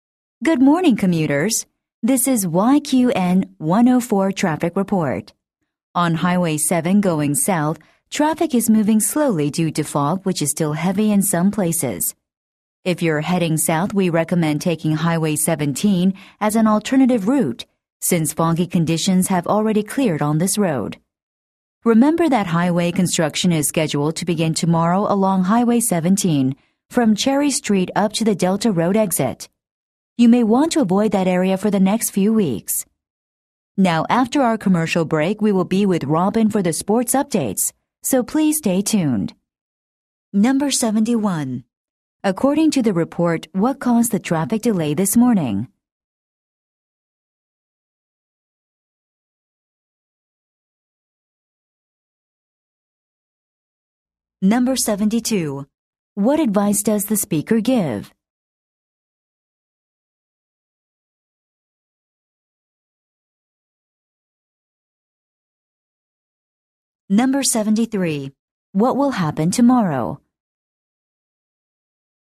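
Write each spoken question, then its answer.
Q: According to the report, what caused the traffic delay this morning?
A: Heavy fog

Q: What advice does the speaker give?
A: Take Highway 17 as an alternative route

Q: What will happen tomorrow?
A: Highway construction will begin on Highway 17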